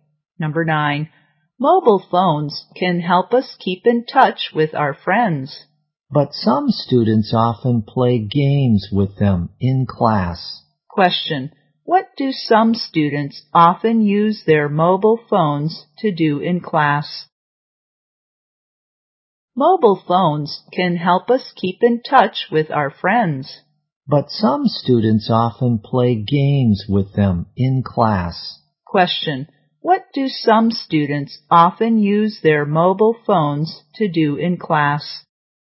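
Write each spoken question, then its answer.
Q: What do some students often use their mobile phones to do in class?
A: Play games.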